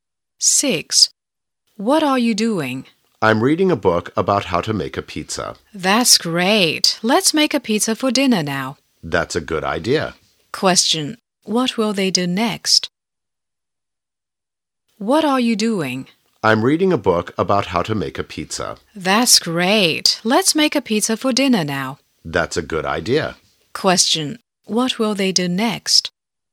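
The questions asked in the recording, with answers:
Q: what will they do next?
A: Make a pizza for dinner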